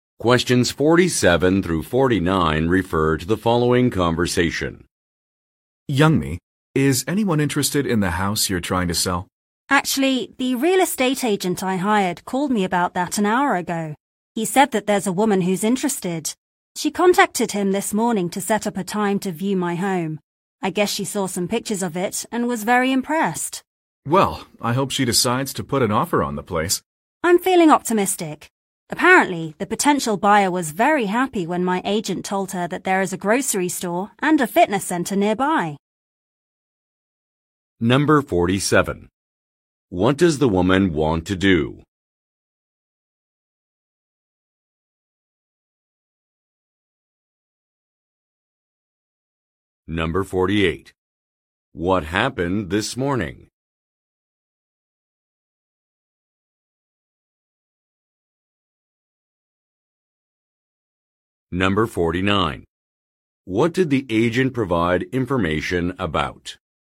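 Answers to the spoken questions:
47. Sell her house
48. A woman contacted the agent to set up a time to view the house
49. Nearby facilities: a grocery store and a fitness center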